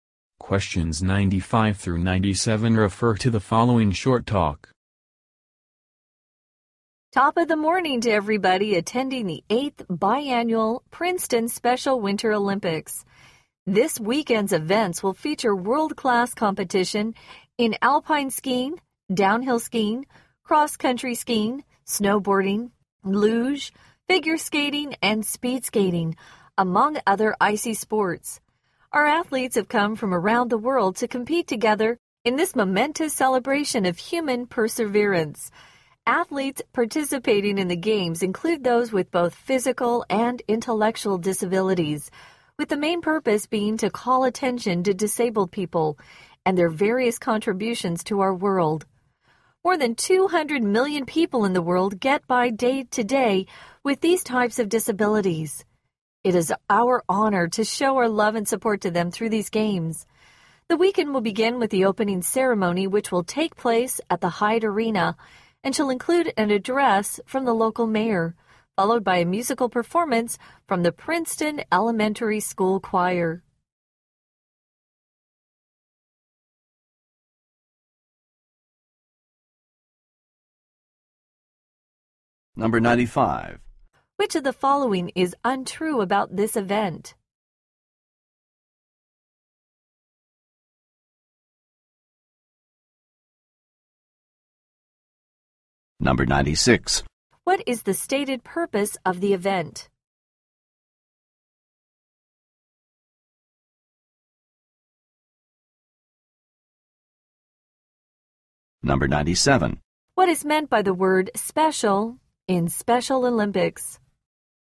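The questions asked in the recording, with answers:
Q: What is the stated purpose of the event?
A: To call attention to disabled people and their contributions

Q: What is meant by the word special in Special Olympics?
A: The athletes have disabilities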